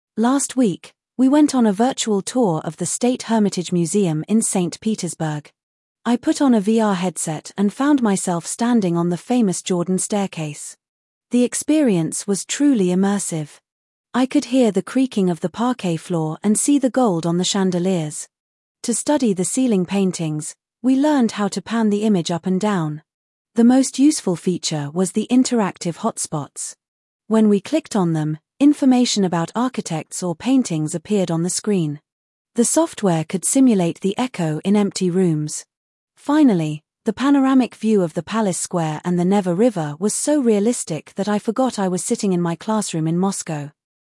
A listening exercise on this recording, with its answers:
Listen to the text and choose only correct statements.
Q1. The author used a VR headset to visit the museum.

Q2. In order to see the paintings on the ceiling, the image had to be panned.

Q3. The panoramic view of the Palace Square looked very realistic.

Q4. The software could simulate sounds like echoes in empty halls.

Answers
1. Верно
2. Верно
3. Верно
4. Верно

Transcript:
Last week, we went on a virtual tour of the State Hermitage Museum in Saint Petersburg. I put on a VR headset and found myself standing on the famous Jordan Staircase. The experience was truly immersive. I could hear the creaking of the parquet floor and see the gold on the chandeliers.
To study the ceiling paintings, we learnt how to pan the image up and down. The most useful feature was the interactive hotspots. When we clicked on them, information about architects or paintings appeared on the screen. The software could simulate the echo in empty rooms. Finally, the panoramic view of the Palace Square and the Neva River was so realistic that I forgot I was sitting in my classroom in Moscow.

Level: 11 класс